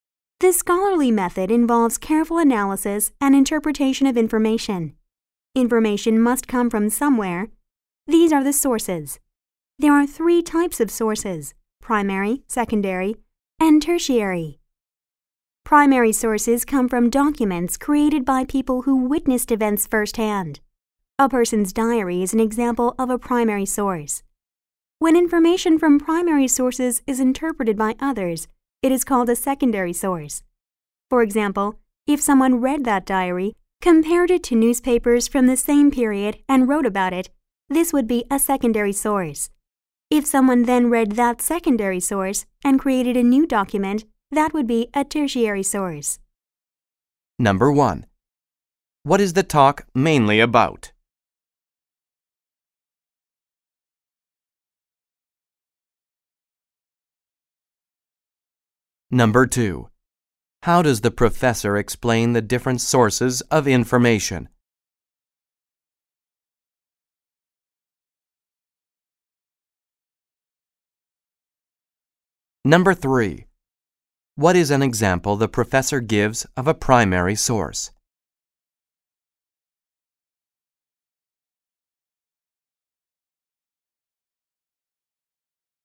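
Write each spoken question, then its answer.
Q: What is the talk mainly about?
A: The three types of information sources: primary, secondary and tertiary

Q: What is an example the professor gives of a primary source?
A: A person's diary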